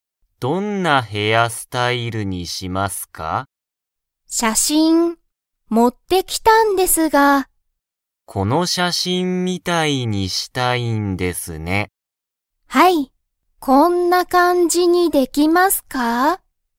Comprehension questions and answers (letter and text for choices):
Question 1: アキは、____を持(も)って来(き)た。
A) お金かね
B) バッグ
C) 写真(しゃしん)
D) スマホ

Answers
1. C) 写真(しゃしん)

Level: Level 1